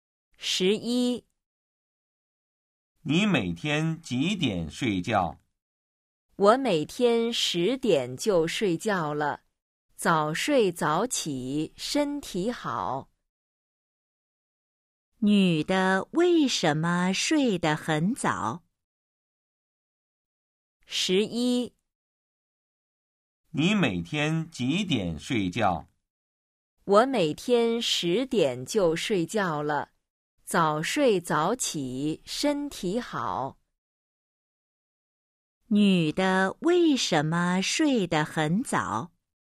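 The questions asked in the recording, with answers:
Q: 女的为什么睡得很早?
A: 早睡早起,身体好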